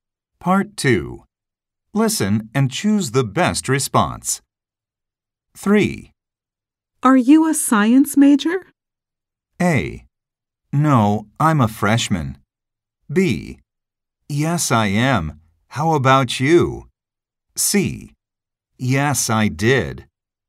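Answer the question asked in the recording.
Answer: B: Yes, I am. How about you?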